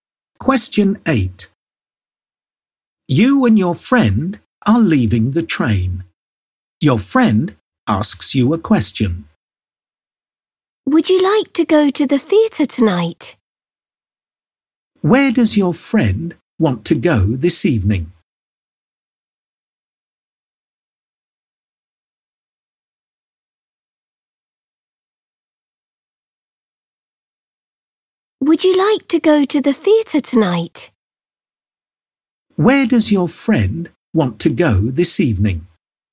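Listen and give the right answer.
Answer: To the theatre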